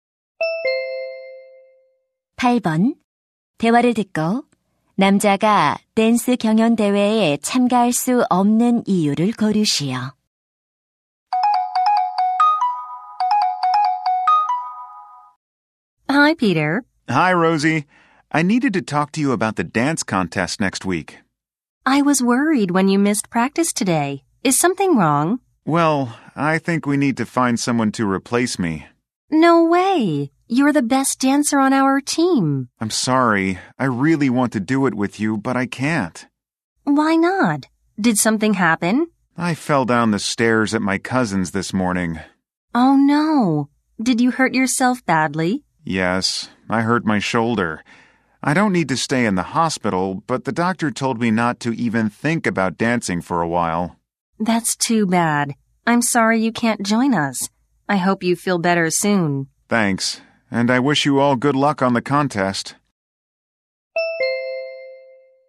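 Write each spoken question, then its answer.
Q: 대화를 듣고 남자가 댄스 경연 대회에 참가할 수 없는 이유를 고르시오.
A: 계단에서 넘어져 어깨를 다쳐서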